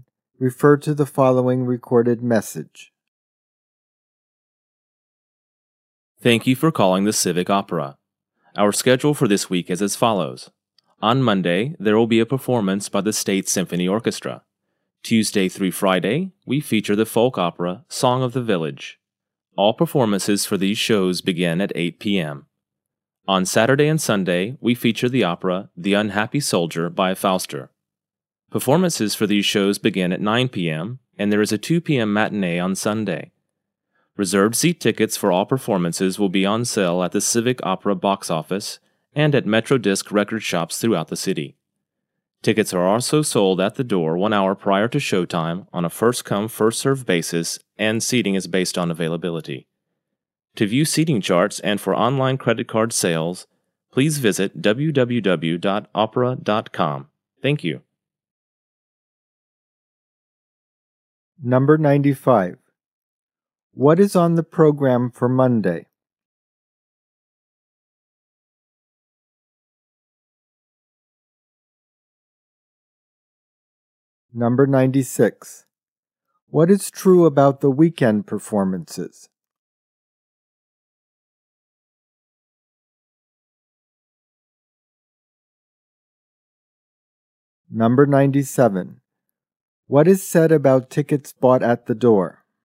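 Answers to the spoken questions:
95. A performance by the State Symphony Orchestra
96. They feature The Unhappy Soldier, start at 9 p.m., with a 2 p.m. Sunday matinee
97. Sold one hour before showtime, first-come first-served, seating based on availability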